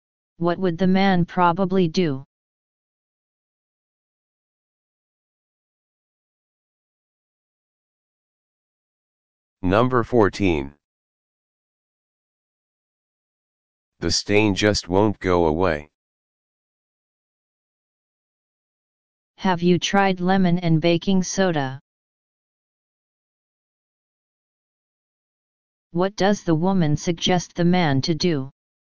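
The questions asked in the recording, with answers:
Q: What does the woman suggest the man to do?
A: Try lemon and baking soda on the stain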